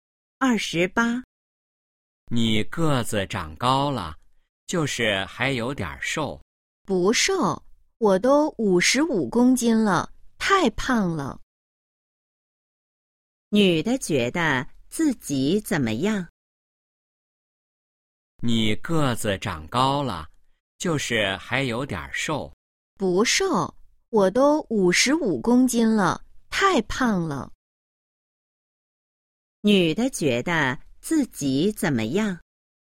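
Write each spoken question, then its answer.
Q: 女的觉得自己怎么样?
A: 太胖了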